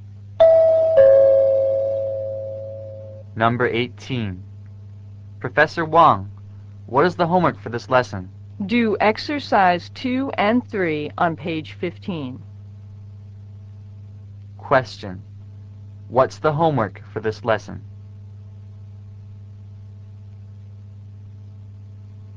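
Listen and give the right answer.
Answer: Exercises 2 and 3 on page 15.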